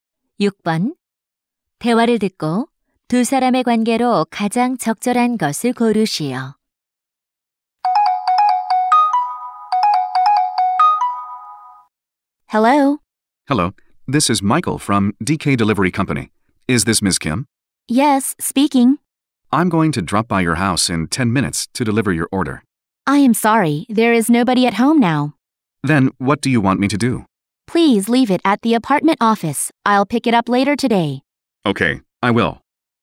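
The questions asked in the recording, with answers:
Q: 대화를 듣고 두 사람의 관계로 가장 적절한 것을 고르시오.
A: 택배 기사 - 고객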